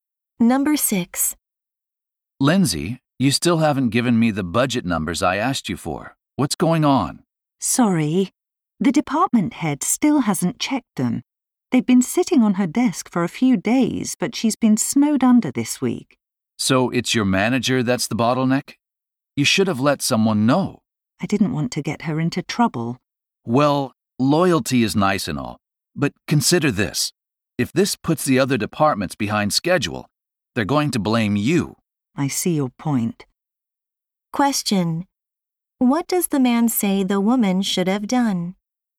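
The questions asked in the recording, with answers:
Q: What does the man say the woman should have done?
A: Told someone that the department head was holding up the numbers.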